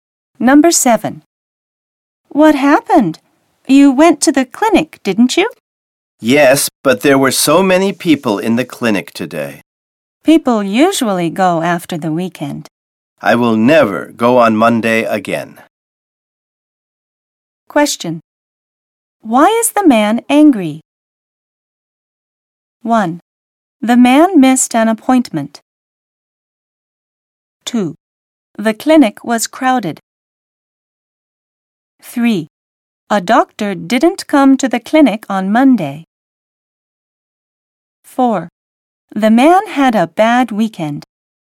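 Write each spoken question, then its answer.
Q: Why is the man angry?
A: 2: The clinic was crowded.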